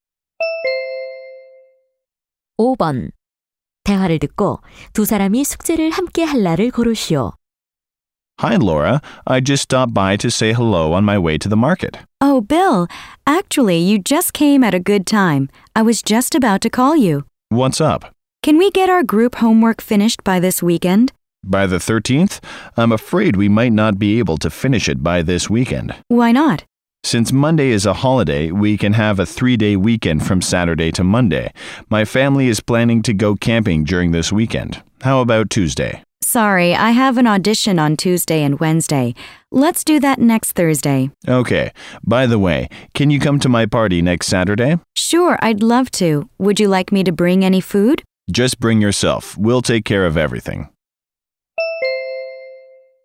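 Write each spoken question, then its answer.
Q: 대화를 듣고 두 사람이 숙제를 함께 할 날을 고르시오.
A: 다음 주 목요일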